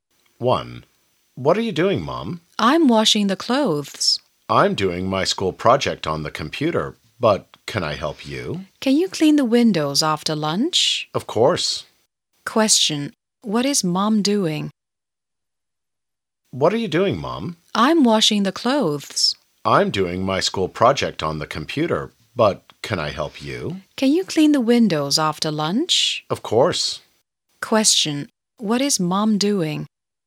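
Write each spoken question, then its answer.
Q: What is Mom doing?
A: She is washing the clothes.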